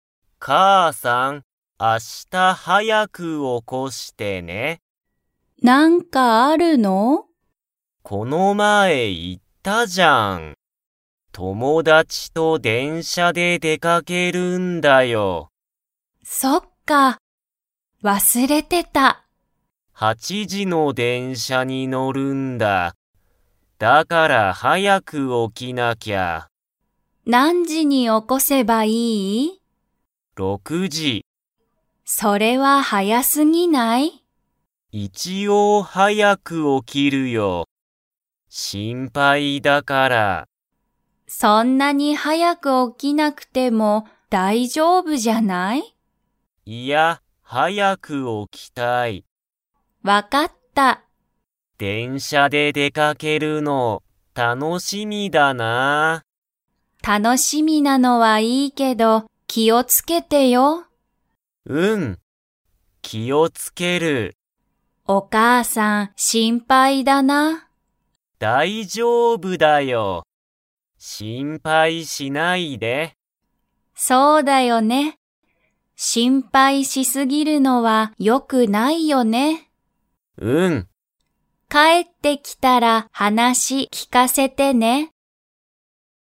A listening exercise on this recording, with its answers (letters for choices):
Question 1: マサシは明日あした、お母かあさんと出でかけますか?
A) はい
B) いいえ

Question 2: 明日あした、マサシは 時じの電車でんしゃに乗のる。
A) 6ろく時じ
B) 7しち時じ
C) 8はち時じ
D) 9く時じ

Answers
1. B
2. C

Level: Level 3